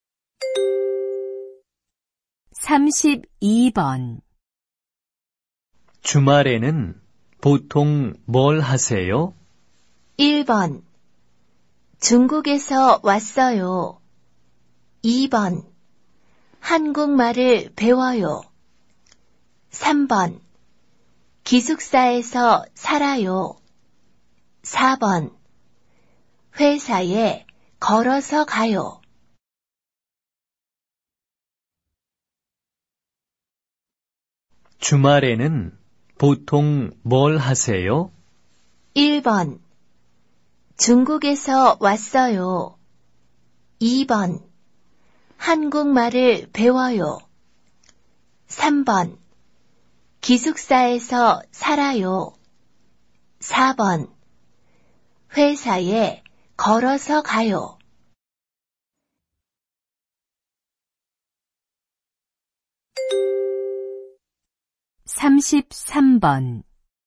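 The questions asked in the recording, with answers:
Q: 주말에는 보통 뭘 하세요?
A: 2: 한국말을 배워요.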